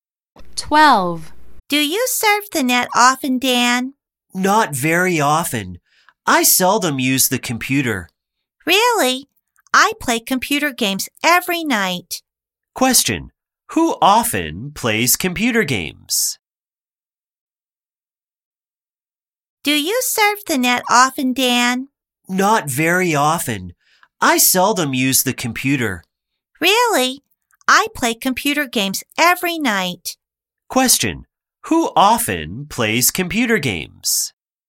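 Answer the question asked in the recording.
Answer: The person talking to Dan (not Dan)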